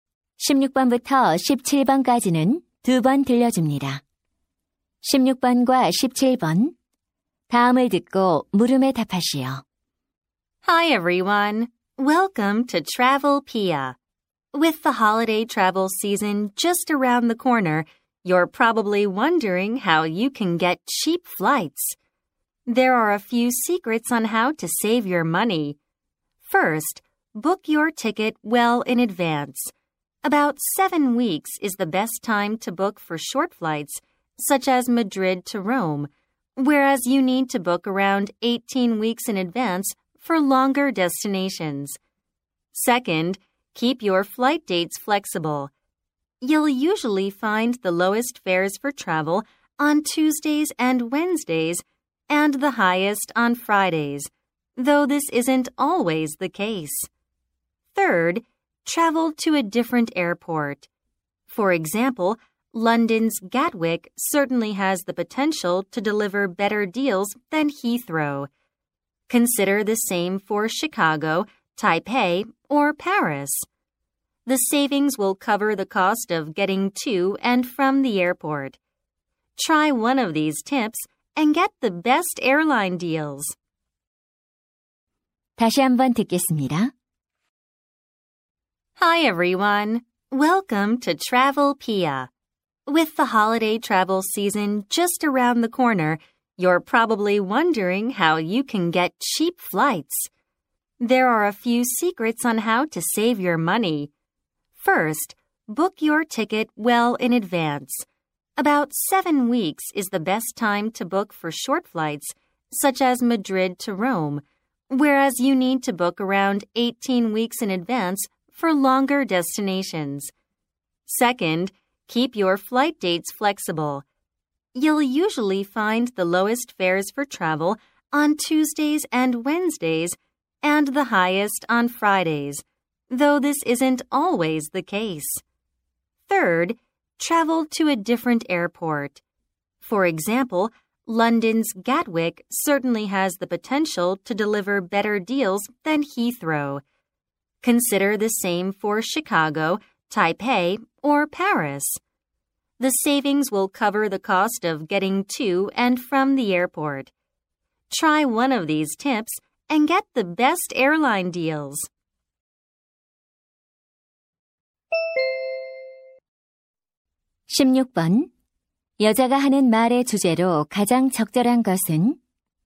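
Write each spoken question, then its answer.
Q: 여자가 하는 말의 주제로 가장 적절한 것은?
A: 저렴한 항공권을 구하는 방법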